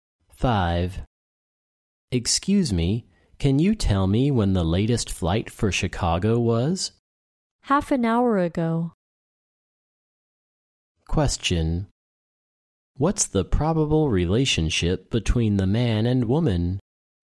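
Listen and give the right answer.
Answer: Passenger and airport clerk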